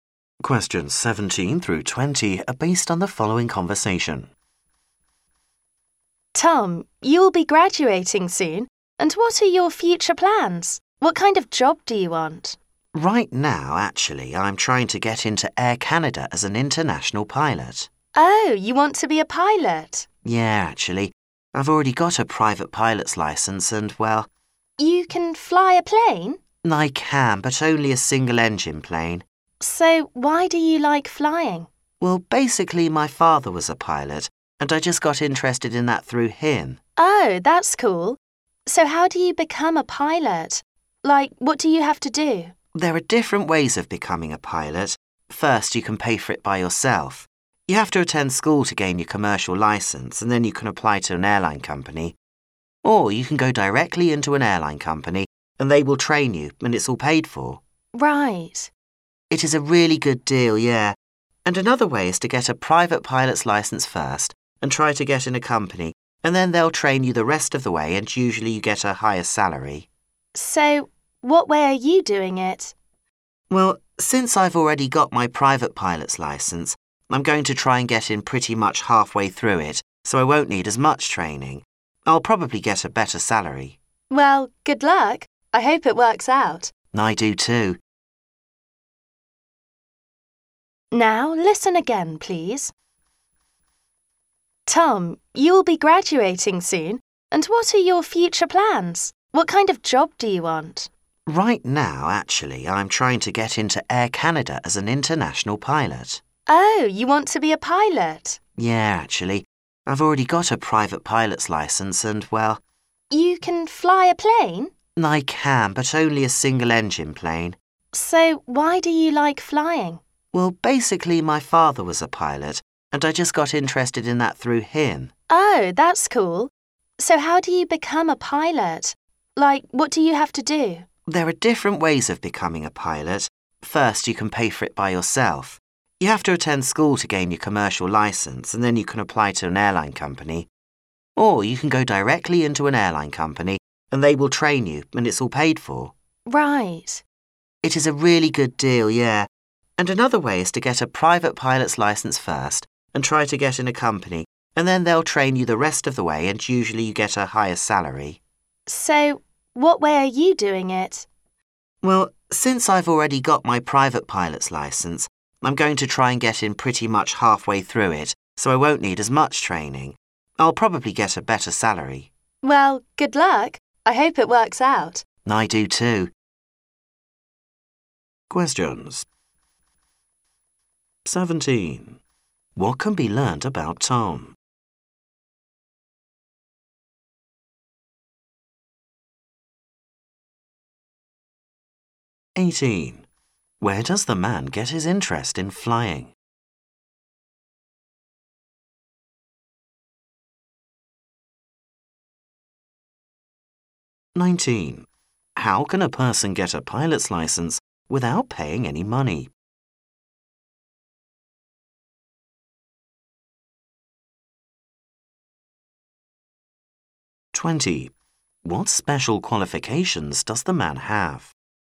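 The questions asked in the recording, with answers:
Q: Where does the man get his interest in flying?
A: From his father, who was a pilot

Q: How can a person get a pilot's license without paying any money?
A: By going directly into an airline company, which trains them

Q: What special qualifications does the man have?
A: A private pilot's license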